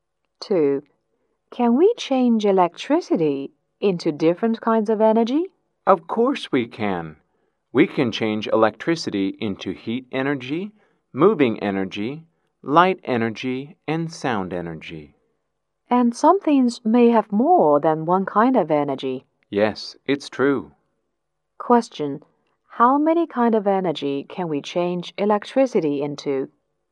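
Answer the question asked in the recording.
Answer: Four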